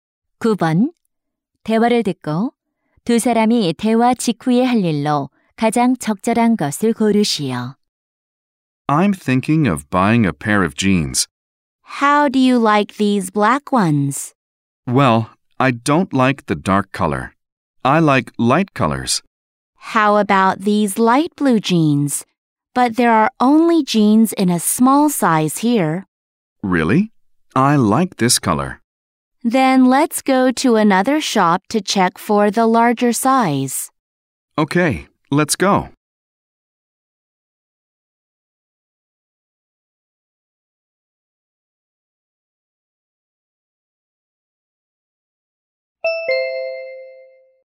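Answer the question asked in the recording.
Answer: 다른 가게에 가서 큰 사이즈 확인하기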